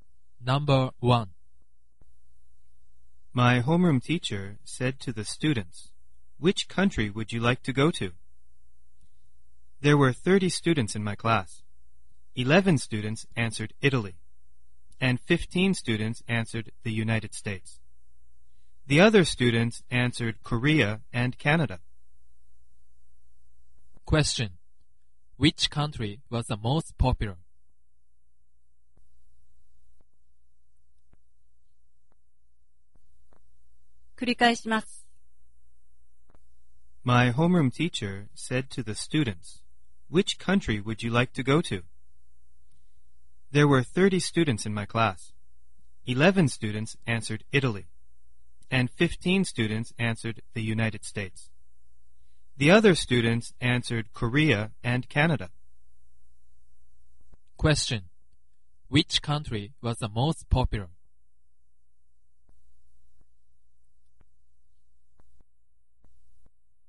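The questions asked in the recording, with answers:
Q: Which country was the most popular?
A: The United States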